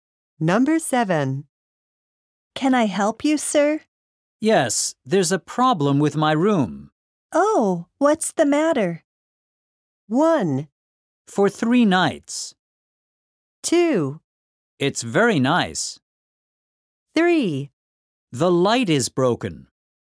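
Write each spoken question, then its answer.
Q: Oh, what's the matter?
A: 3: The light is broken.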